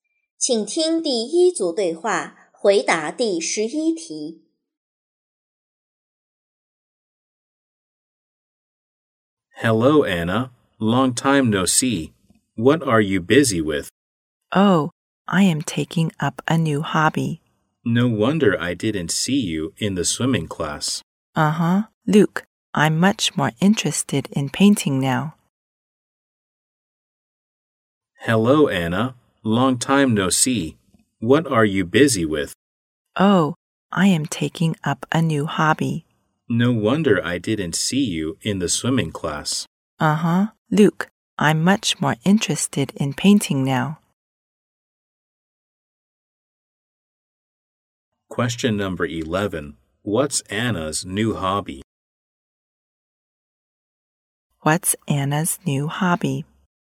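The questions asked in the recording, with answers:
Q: What's Anna's new hobby?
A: Painting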